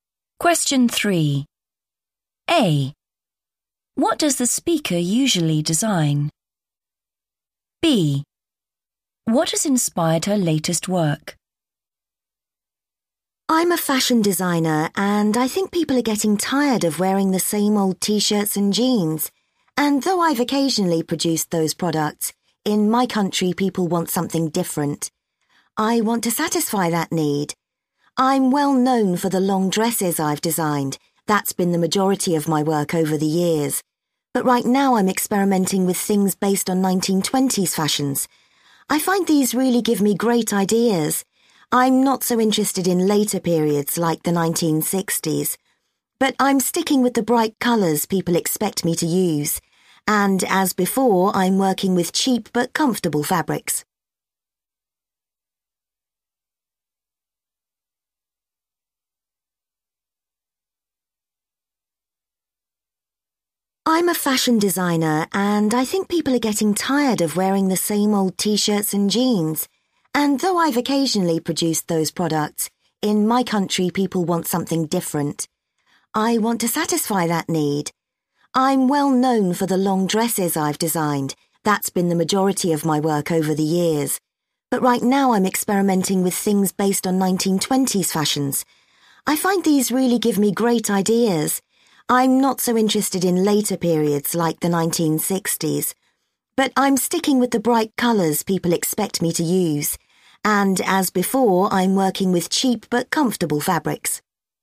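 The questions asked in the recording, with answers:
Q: What does the speaker usually design?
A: long dresses

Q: What has inspired her latest work?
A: 1920s fashions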